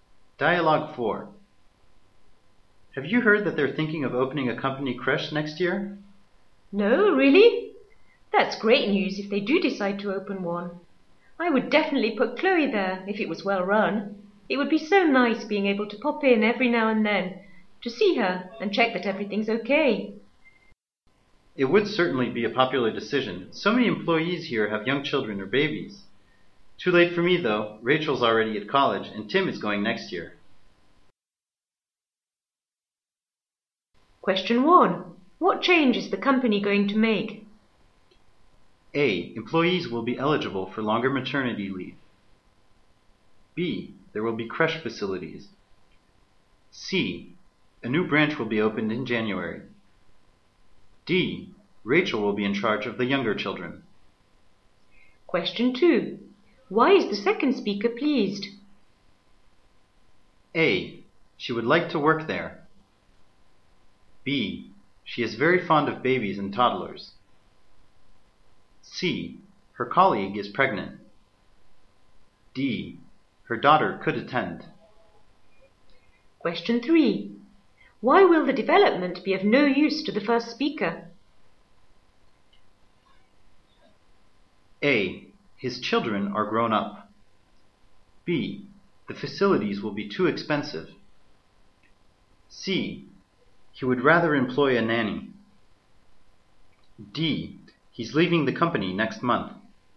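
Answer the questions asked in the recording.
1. B: There will be creche facilities.
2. D: Her daughter could attend.
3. A: His children are grown up.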